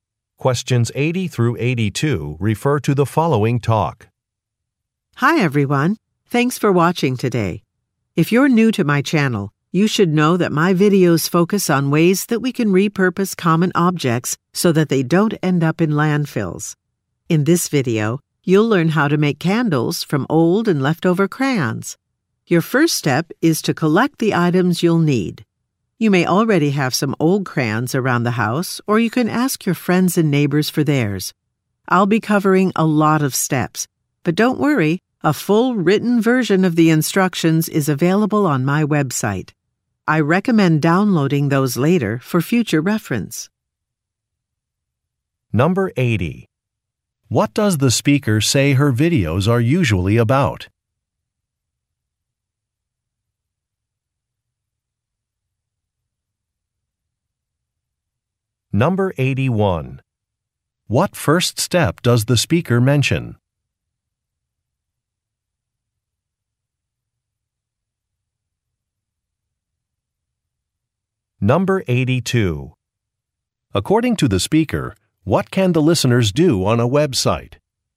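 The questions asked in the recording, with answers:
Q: What does the speaker say her videos are usually about?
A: Repurposing common objects to keep them out of landfills.

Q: What first step does the speaker mention?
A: Collecting the items needed.

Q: According to the speaker, what can the listeners do on a website?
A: Download written instructions.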